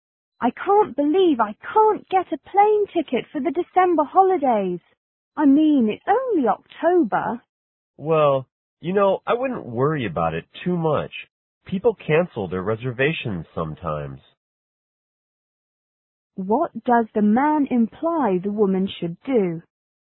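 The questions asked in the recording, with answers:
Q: What does the man imply the woman should do?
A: Wait for someone to cancel a reservation.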